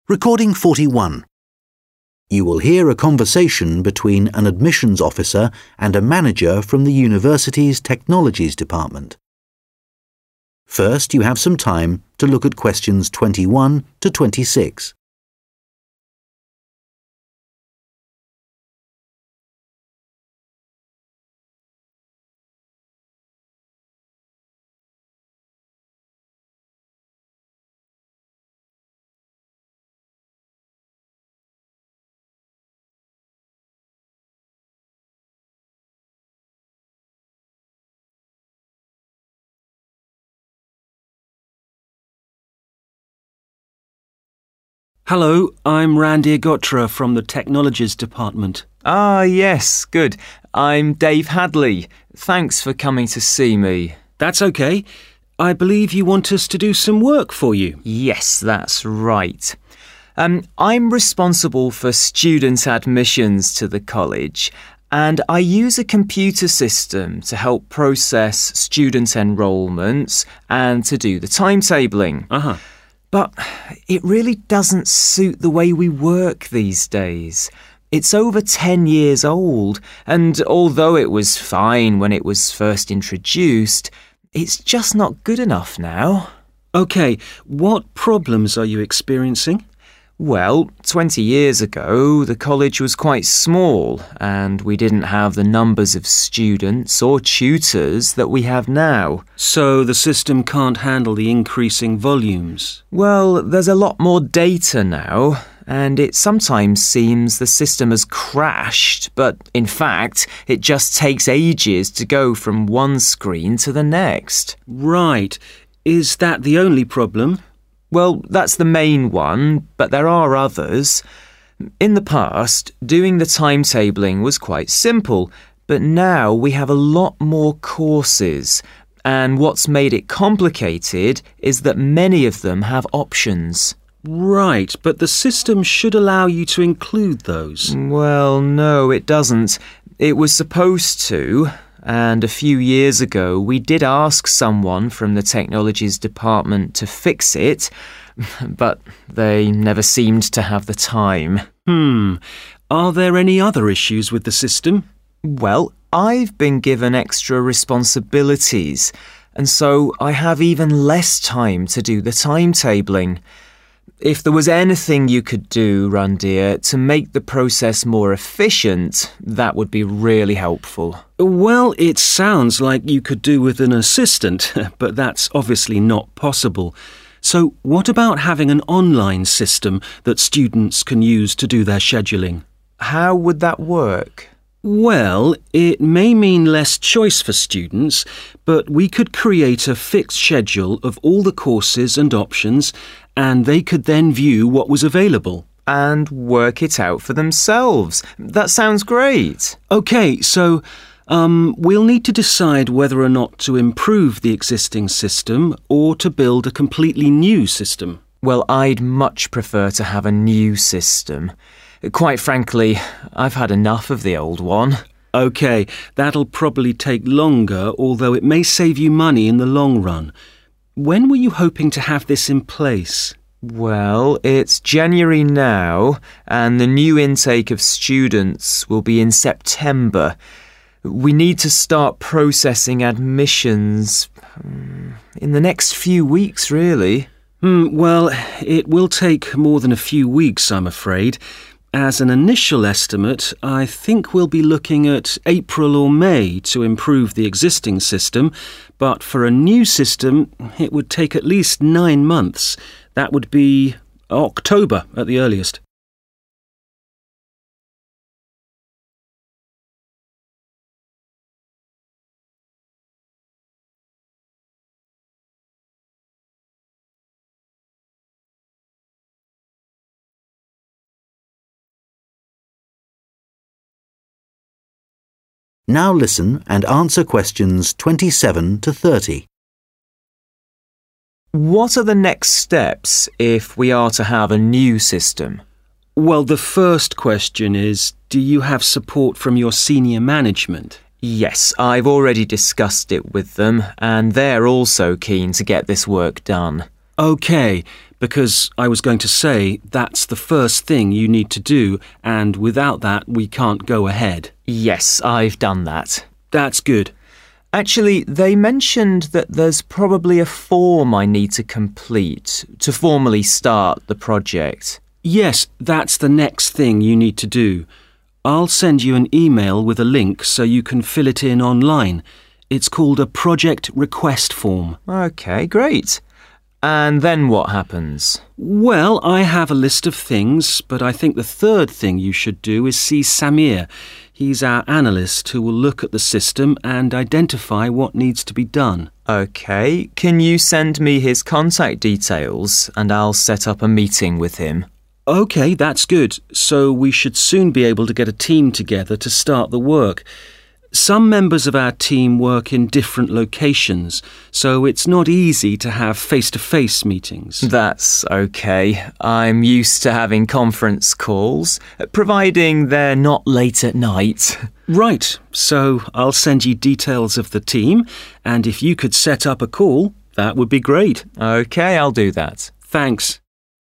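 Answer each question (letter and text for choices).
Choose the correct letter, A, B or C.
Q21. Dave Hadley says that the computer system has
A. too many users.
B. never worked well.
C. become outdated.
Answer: C. become outdated.

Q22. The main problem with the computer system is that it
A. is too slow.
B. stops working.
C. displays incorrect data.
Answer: A. is too slow.

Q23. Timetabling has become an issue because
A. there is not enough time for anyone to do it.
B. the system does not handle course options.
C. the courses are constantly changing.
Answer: B. the system does not handle course options.

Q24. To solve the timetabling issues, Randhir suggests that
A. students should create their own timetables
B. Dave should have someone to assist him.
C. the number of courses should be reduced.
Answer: A. students should create their own timetables

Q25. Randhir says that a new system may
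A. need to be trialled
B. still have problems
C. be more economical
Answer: C. be more economical

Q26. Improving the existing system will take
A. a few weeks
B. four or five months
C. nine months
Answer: B. four or five months

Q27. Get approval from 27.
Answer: senior management

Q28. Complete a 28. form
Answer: project request

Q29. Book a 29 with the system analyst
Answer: meeting

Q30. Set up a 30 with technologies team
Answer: conference call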